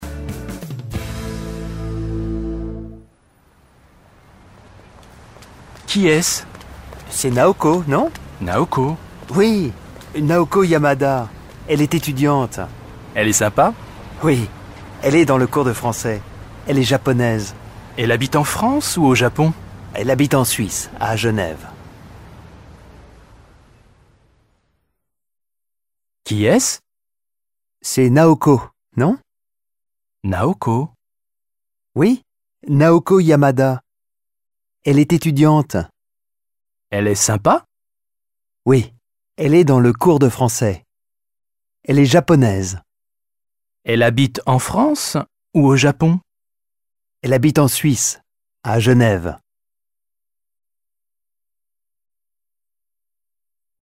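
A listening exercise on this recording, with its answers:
1. dites si c'est vrai ou faux.说出下列句子是否符合事实。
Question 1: Naoko est une femme.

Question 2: Elle est française.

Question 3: Elle est professeur.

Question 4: Elle habite en France.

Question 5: Elle est sympa.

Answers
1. vrai
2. faux
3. faux
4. faux
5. vrai

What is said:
— Qui est-ce ?
— C'est Naoko, non ?
— Naoko ?
— Oui, Naoko Yamada. Elle est étudiante.
— Oui. Elle est dans le cours de français, elle est japonaise.
— Elle habite en France ou au Japon ?
— Elle habite en Suisse, à Genève.

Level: DÉBUTANT A1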